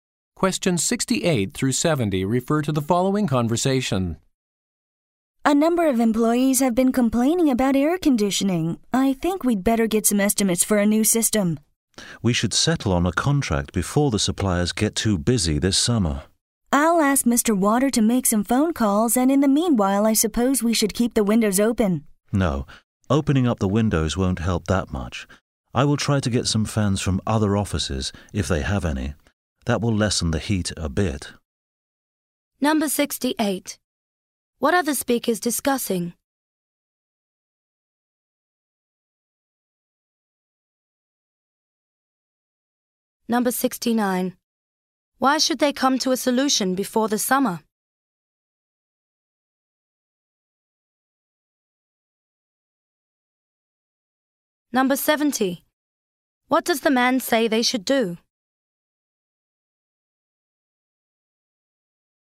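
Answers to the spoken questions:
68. Problems with the air conditioning
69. Suppliers will get too busy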